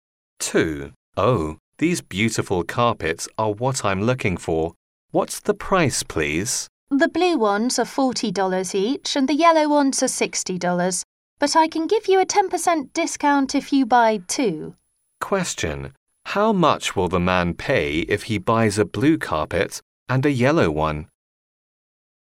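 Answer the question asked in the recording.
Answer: $90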